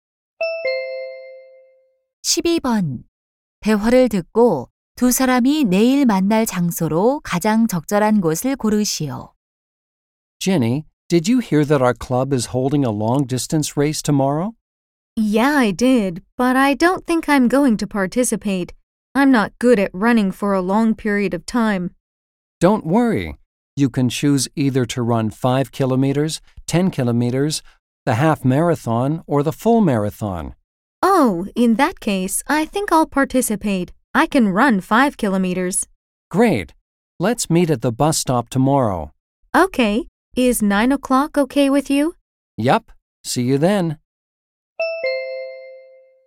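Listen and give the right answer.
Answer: 버스 정류장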